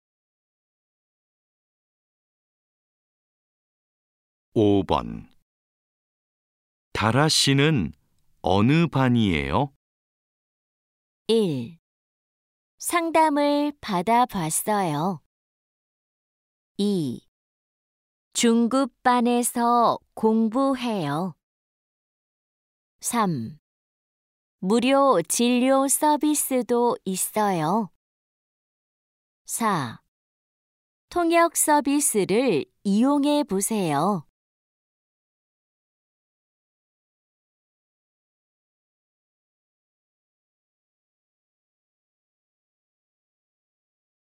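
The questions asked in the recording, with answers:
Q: 다라 씨는 어느 반이에요?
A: 2: 중급반에서 공부해요.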